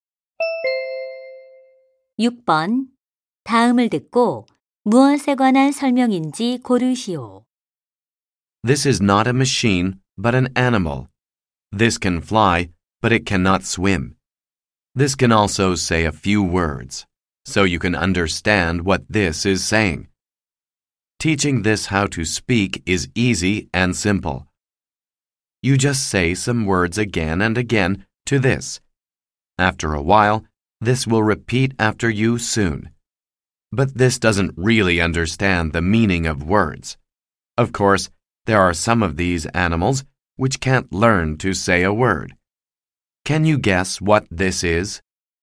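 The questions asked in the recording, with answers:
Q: 다음을 듣고 무엇에 관한 설명인지 고르시오.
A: 앵무새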